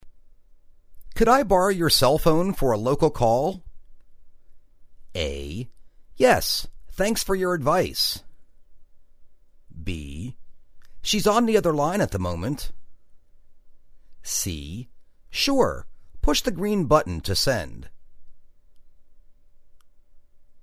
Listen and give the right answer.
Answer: Sure, push the green button to send.